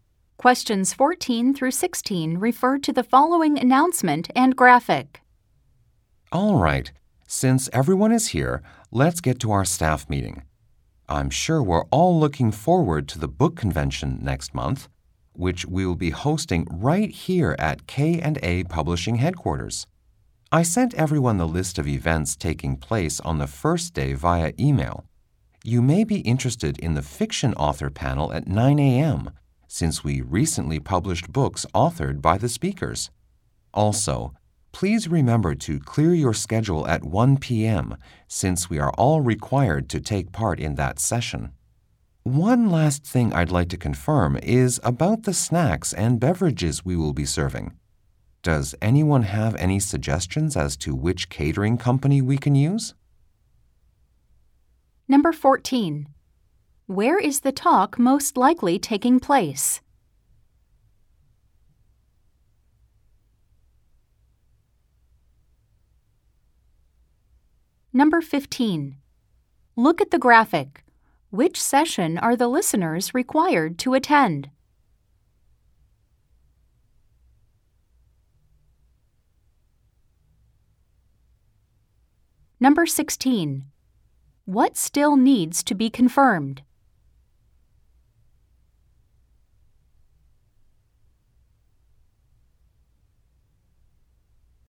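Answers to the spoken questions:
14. At a publishing company (K&A Publishing headquarters)
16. Which catering company to use for snacks and beverages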